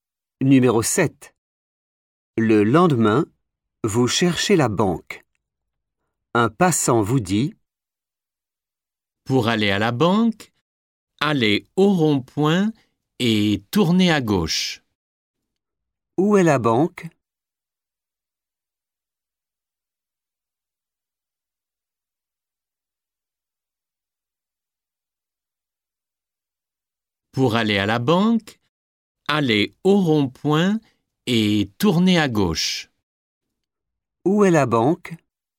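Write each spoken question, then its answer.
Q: Où est la banque?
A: au rond-point, à gauche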